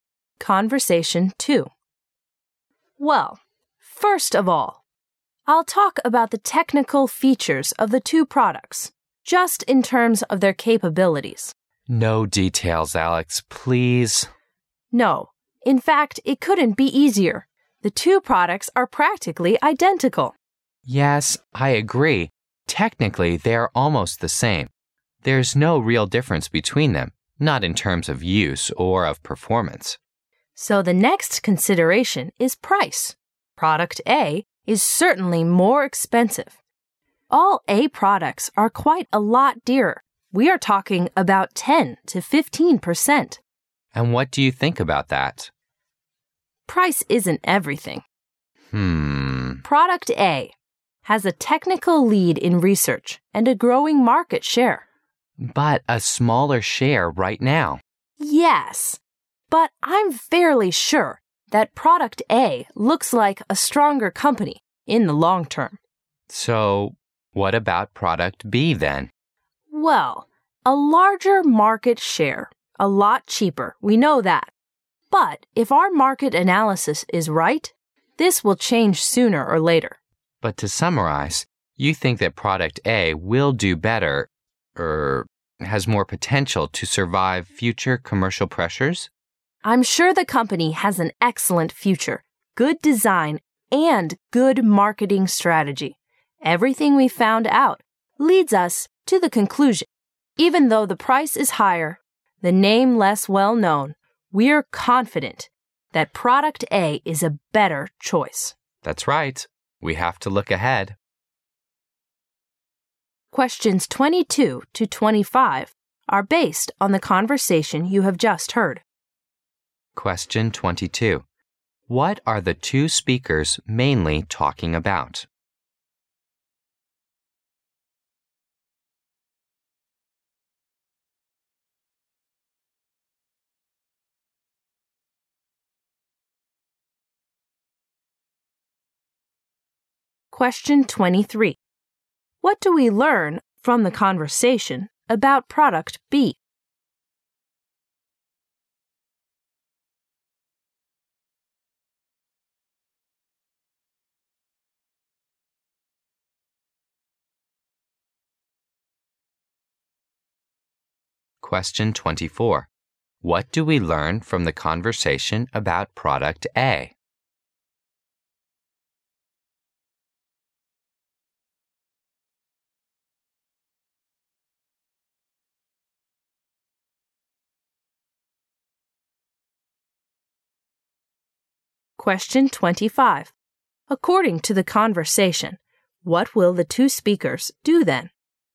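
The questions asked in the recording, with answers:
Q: What are the two speakers mainly talking about?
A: Which of two products to choose

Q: What do we learn from the conversation about product B?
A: It is cheaper and has a larger market share right now

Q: What do we learn from the conversation about product A?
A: It is more expensive but has a better future

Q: According to the conversation, what will the two speakers do then?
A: Choose product A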